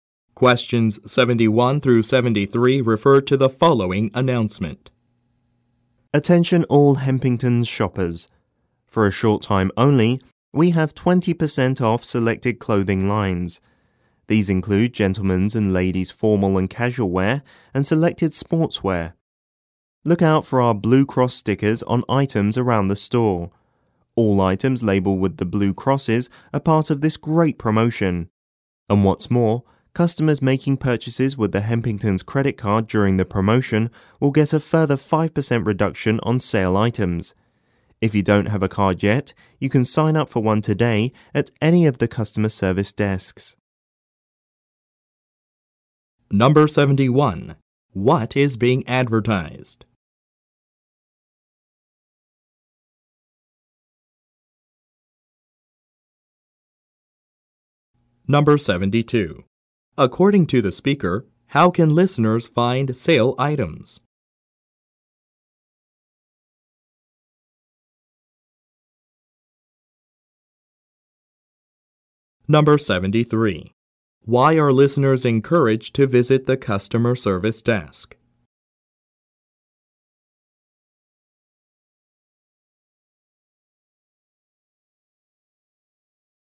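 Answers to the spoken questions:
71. A sale of 20% off selected clothing
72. Look for blue cross stickers on items
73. To sign up for a Hempington's credit card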